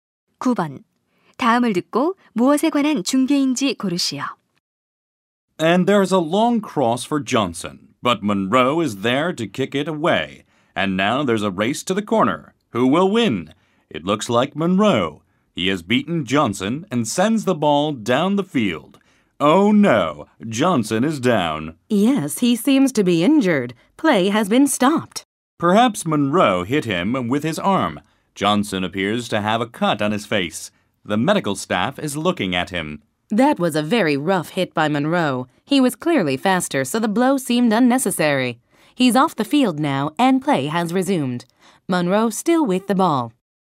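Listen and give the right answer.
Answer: 축구 경기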